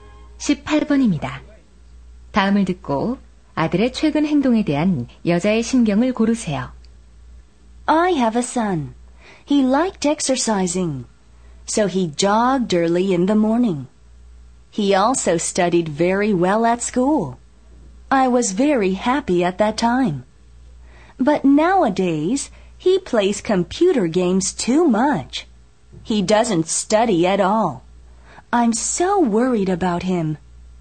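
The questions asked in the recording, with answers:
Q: 다음을 듣고 아들의 최근 행동에 대한 여자의 심경을 고르세요.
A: 걱정스러움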